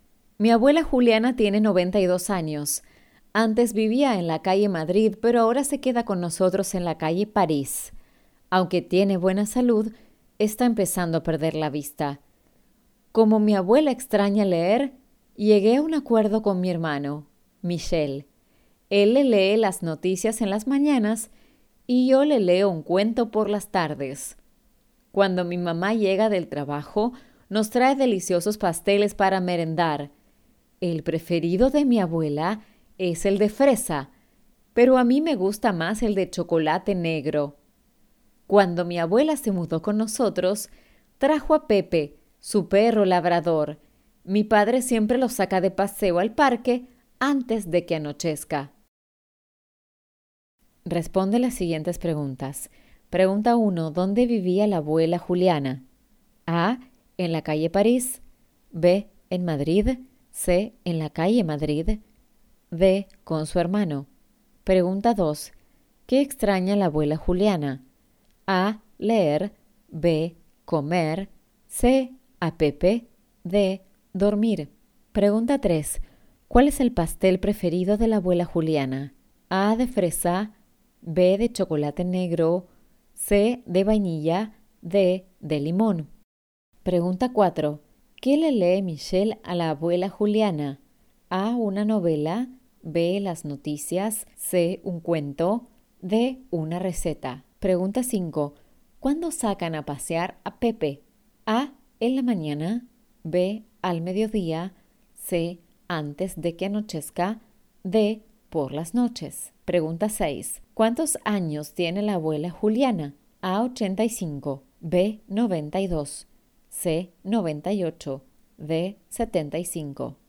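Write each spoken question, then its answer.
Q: ¿Dónde vivía la abuela Juliana?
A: C: En la calle Madrid

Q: ¿Qué extraña la abuela Juliana?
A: A: Leer

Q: ¿Cuál es el pastel preferido de la abuela Juliana?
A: A: De fresa

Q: ¿Qué le lee Michelle a la abuela Juliana?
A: B: Las noticias

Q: ¿Cuándo sacan a pasear a Pepe?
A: C: Antes de que anochezca

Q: ¿Cuántos años tiene la abuela Juliana?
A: B: 92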